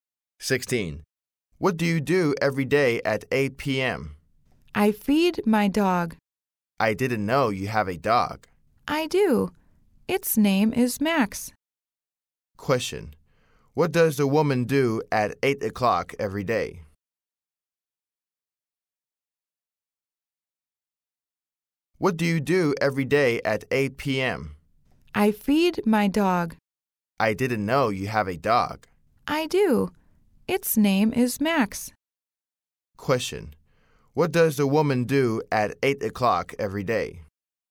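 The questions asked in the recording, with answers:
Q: Question: What does the woman do at 8 o'clock every day?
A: She feeds her dog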